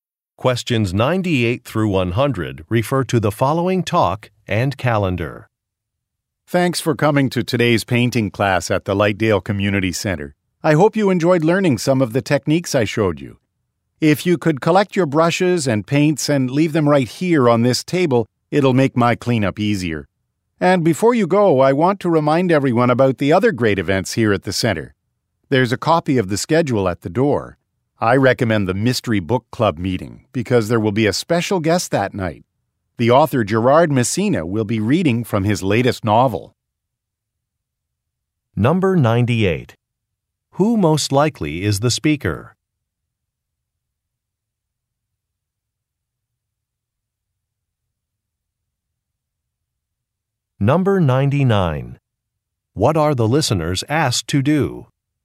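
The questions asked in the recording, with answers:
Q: Who most likely is the speaker?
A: A painting instructor

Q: What are the listeners asked to do?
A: Leave their brushes and paints on the table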